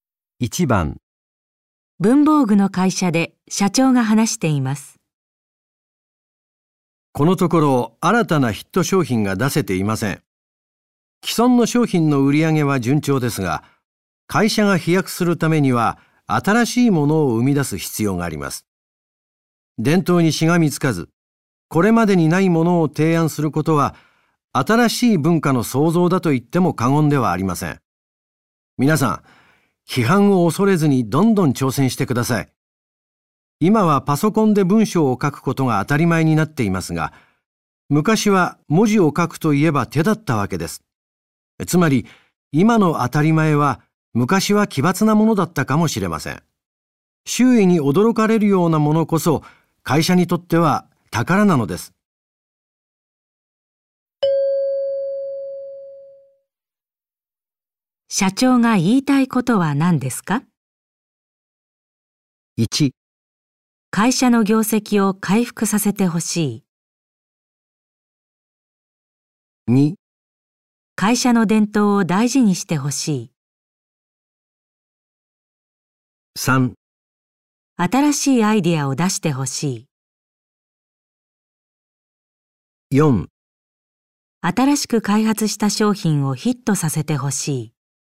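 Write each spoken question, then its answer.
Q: 社長が言いたいことは何ですか?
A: 3: 新しいアイデアを出してほしい。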